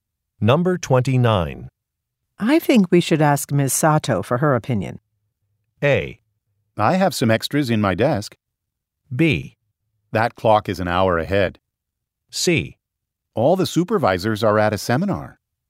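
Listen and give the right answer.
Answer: C: All the supervisors are at a seminar.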